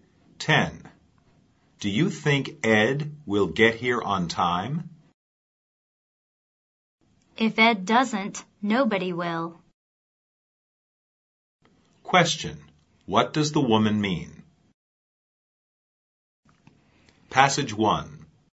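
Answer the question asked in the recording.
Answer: Ed is always on time; if anyone arrives on time, he will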